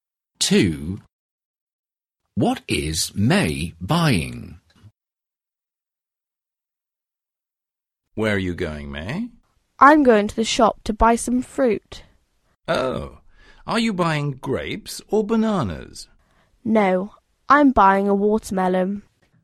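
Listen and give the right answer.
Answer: a watermelon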